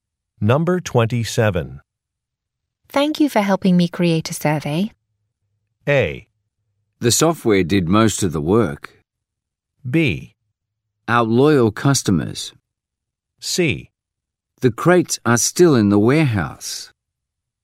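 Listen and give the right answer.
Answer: A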